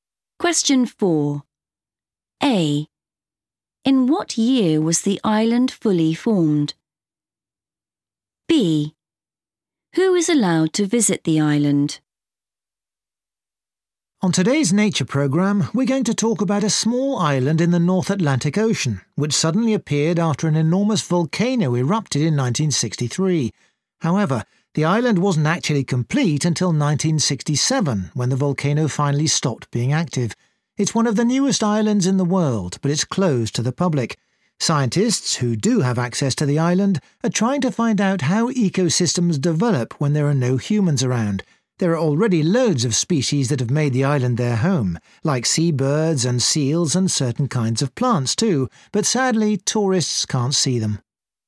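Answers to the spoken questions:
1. 1967
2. scientists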